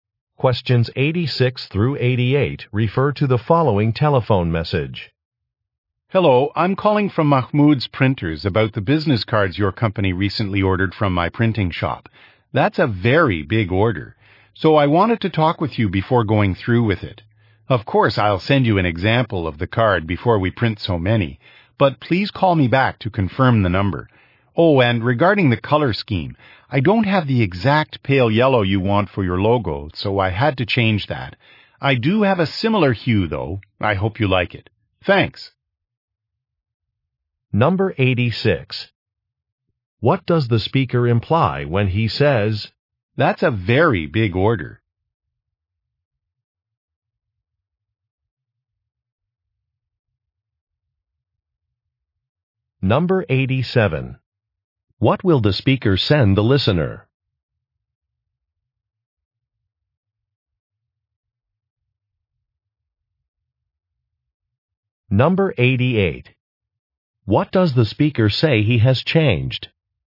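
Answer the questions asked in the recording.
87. An example of the business card
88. The logo color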